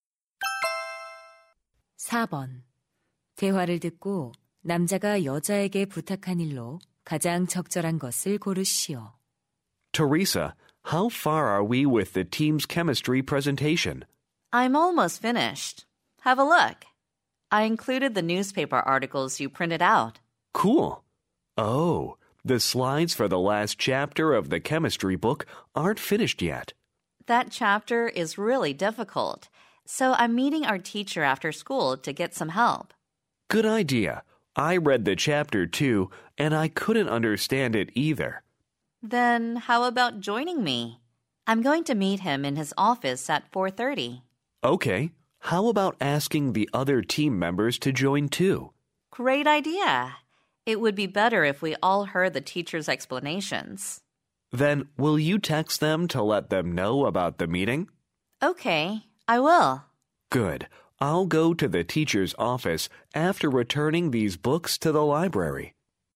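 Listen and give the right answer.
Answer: 팀원들에게 모임에 대해 문자 보내기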